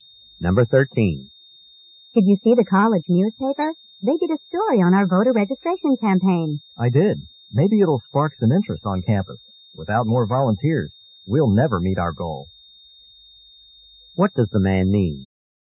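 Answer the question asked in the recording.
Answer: They need more volunteers to reach their goal.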